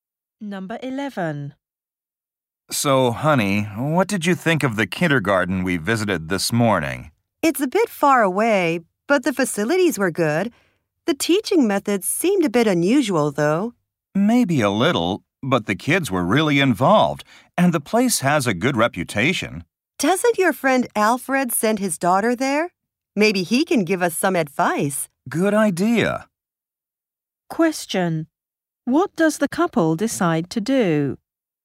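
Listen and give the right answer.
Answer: Ask their friend Alfred for advice about the kindergarten.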